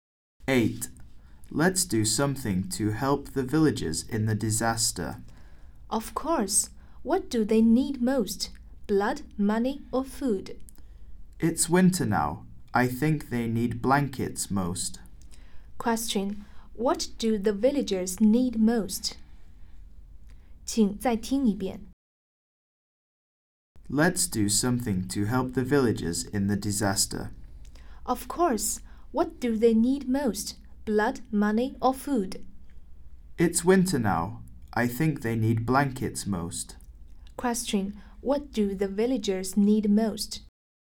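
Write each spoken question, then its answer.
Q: What do the villagers need most?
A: Blankets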